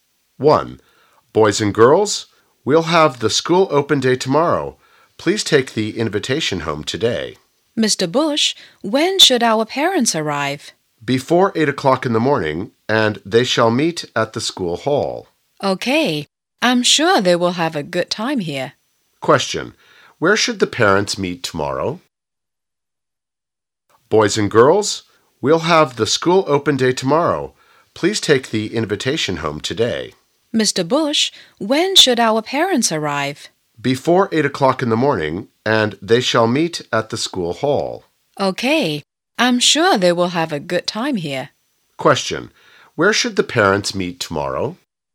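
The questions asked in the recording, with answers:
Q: Question, where should the parents meet tomorrow?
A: At the school hall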